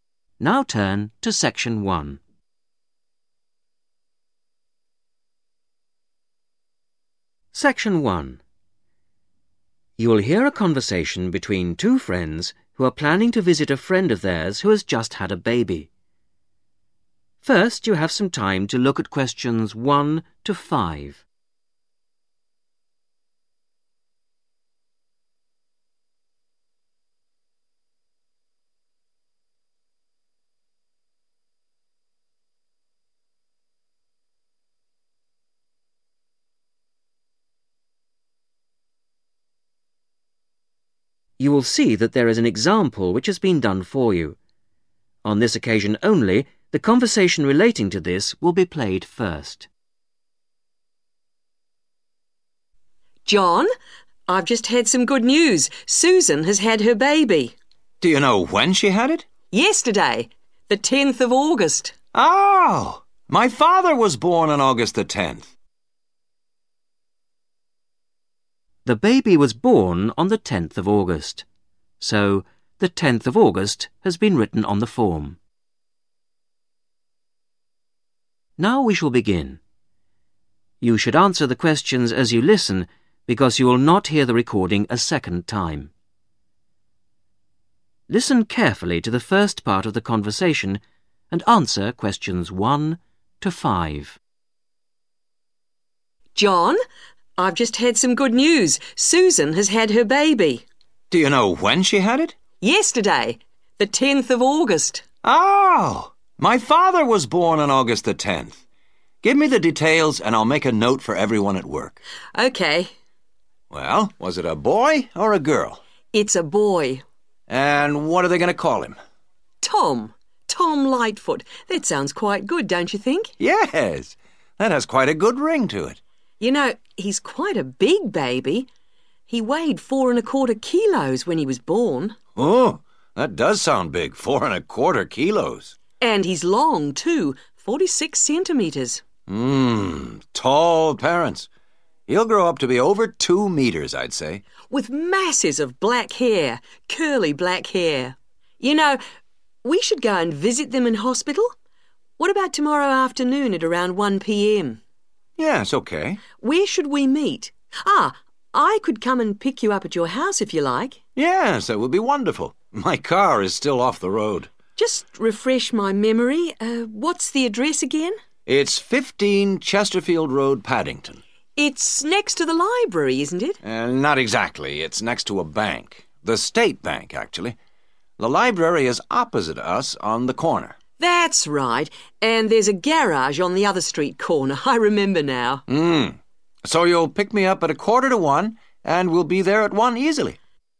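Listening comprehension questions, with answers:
Complete the form below. Write NO MORE THAN THREE WORDS AND/OR A NUMBER for each answer.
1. Weight: (1) ......................... kgs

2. Length: 2) ......................... cms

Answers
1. 4.25
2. 46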